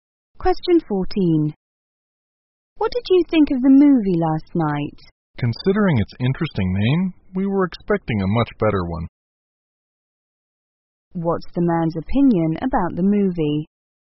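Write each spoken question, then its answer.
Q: What's the man's opinion about the movie?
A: It was disappointing, not as good as its name suggested.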